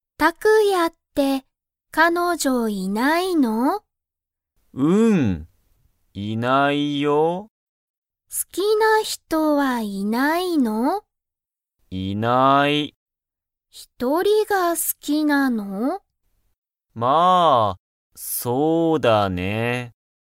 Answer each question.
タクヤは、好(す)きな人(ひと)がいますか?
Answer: いいえ

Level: Level 1